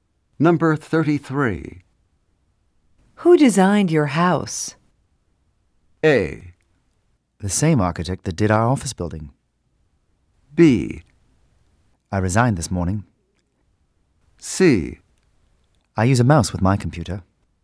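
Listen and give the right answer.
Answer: A: The same architect that did our office building.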